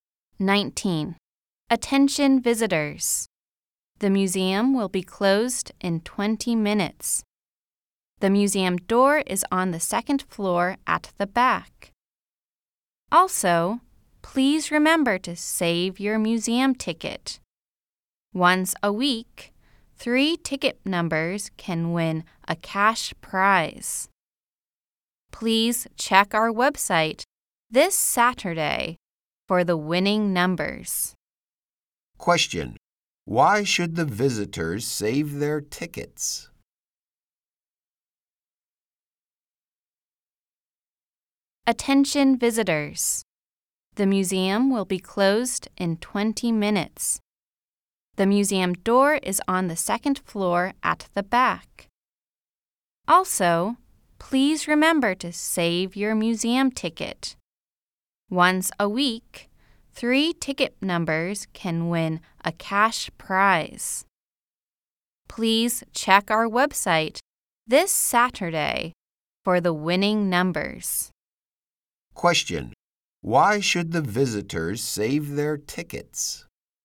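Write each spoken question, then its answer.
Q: Why should the visitors save their tickets?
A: Three ticket numbers can win a cash prize each week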